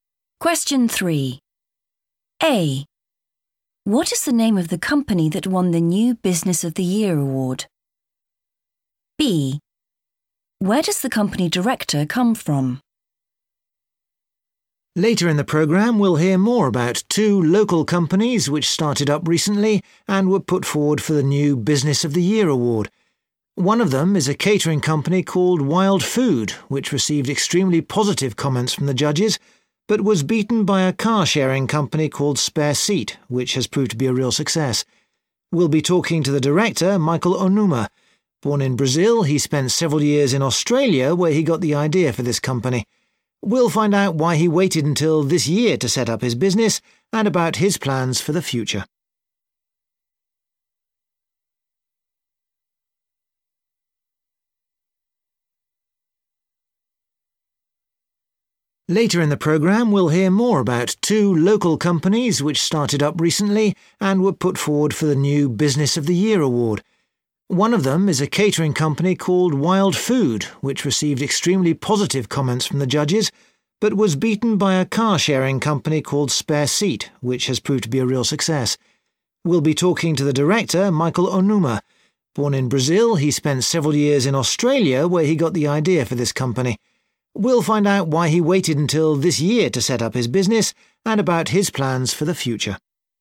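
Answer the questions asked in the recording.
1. Spare Seat
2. Brazil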